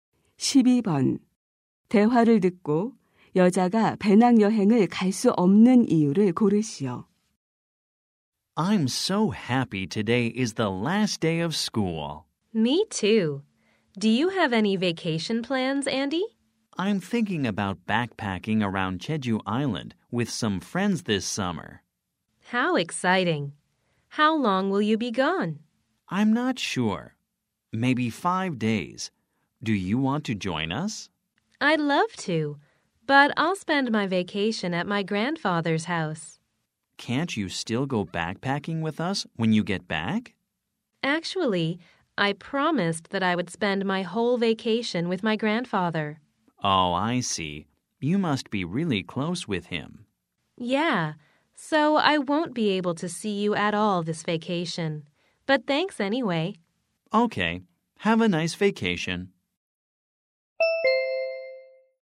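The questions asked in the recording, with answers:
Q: 대화를 듣고 여자가 배낭 여행을 갈 수 없는 이유를 고르시오.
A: 방학 내내 할아버지 댁에서 지내기로 약속해서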